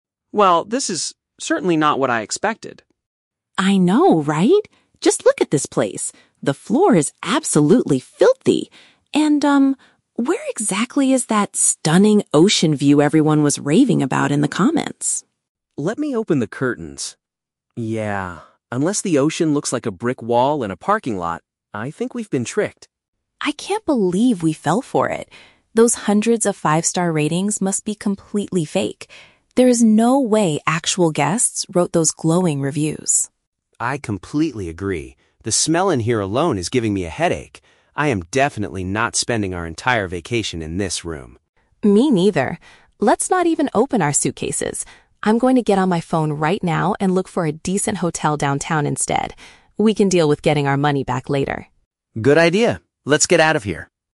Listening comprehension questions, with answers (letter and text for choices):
Listen to two tourists talking as they arrive at their accommodation. Choose the correct answer (A, B, or C).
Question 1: What does the man see when he looks out the window?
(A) A beautiful view of the sea.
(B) A brick wall and a parking area.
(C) A busy street with a lot of traffic.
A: (B) A brick wall and a parking area.

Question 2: What do the speakers conclude about the five-star reviews on the internet?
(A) They were completely unauthentic.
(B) They were written by the homestay owner.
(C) They accurately described the stunning view.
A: (A) They were completely unauthentic.

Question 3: What is the couple's immediate plan?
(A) Demand their money back from the host right away.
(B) Clean the filthy floor and open their suitcases.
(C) Search for alternative accommodation in the city center.a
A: (C) Search for alternative accommodation in the city center.a

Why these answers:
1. John opens the curtains and says he sees a "brick wall and a parking lot". "Parking area" is a simple synonym for "parking lot". The Trap: Option (A) is the Trap of Contradiction. Lisa mentions the "stunning ocean view" from the comments, but they both realize it is not really there. Option (C) is a plausible view from a bad hotel room, but it is not mentioned in the audio.
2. Lisa states that the ratings "must be completely fake" and that actual guests didn't write them. "Unauthentic" is a B1 paraphrase for "fake" or "not real". The Trap: Option (C) is a trap because it contains exact words from the audio ("stunning view"), but it is the opposite of the truth. Option (B) is a very logical real-world assumption (the owner wrote them), but the speakers only say they are fake; they don't specify who wrote them.
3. Lisa says she will use her phone to "look for a decent hotel downtown". "Alternative accommodation" is a paraphrase for "a decent hotel", and "downtown" means "in the city center". The Trap: Option (A) is a trap. Lisa mentions "getting our money back" (a refund), but she says they will deal with that later, not right away. Option (B) contains exact words ("filthy floor", "suitcases"), but Lisa specifically says "Let's not even open our suitcases", so they have no intention of staying or cleaning.

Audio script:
John: Well, this is... certainly not what I expected.
Lisa: I know, right? Just look at this place. The floor is absolutely filthy! And, um, where exactly is that 'stunning ocean view' everyone was raving about in the comments?
John: Let me open the curtains. Yeah... unless the ocean looks like a brick wall and a parking lot, I think we've been tricked.
Lisa: I can't believe we fell for it. Those hundreds of five-star ratings must be completely fake. There is no way actual guests wrote those glowing reviews.
John: I completely agree. The smell in here alone is giving me a headache. I am definitely not spending our entire vacation in this room.
Lisa: Me neither. Let's not even open our suitcases. I'm going to get on my phone right now and look for a decent hotel downtown instead. We can deal with getting our money back later.